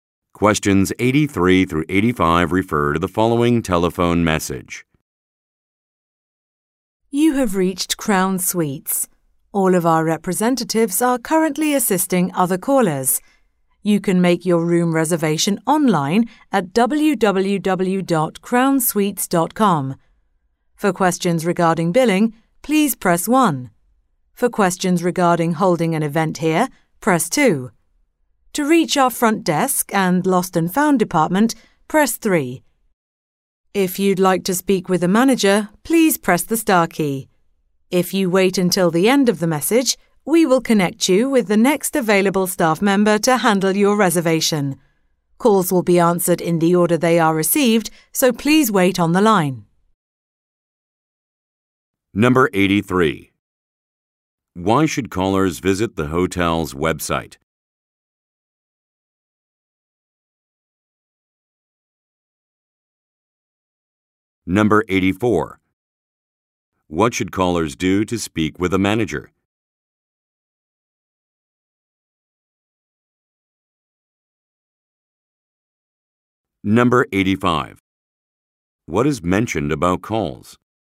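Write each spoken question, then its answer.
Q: Why should callers visit the hotel's website?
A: To make a room reservation

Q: What should callers do to speak with a manager?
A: Press the star key

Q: What is mentioned about calls?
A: They will be answered in the order they are received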